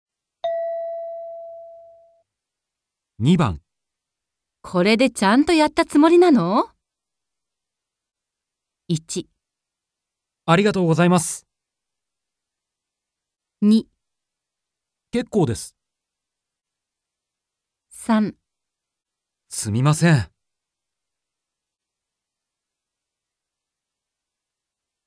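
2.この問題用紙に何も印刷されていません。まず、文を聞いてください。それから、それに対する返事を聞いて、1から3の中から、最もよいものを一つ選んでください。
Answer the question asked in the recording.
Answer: すみません。

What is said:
M: 1 ありがとうございます。

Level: N2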